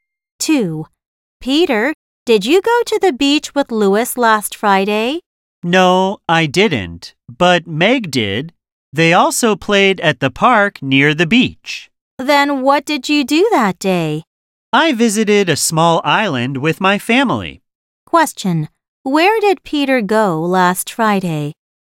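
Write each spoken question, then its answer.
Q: Where did Peter go last Friday?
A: To a small island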